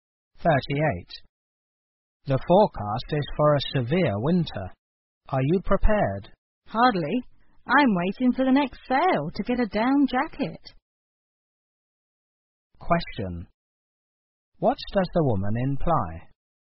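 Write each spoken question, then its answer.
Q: What does the woman imply?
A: She is not yet prepared for winter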